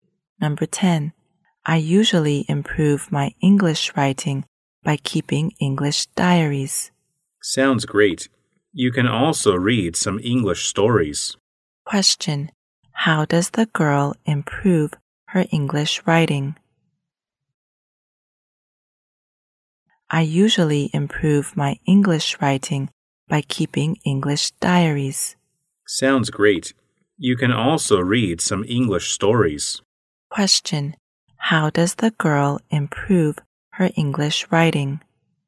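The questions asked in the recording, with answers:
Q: Question: How does the girl improve her English writing?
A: By keeping English diaries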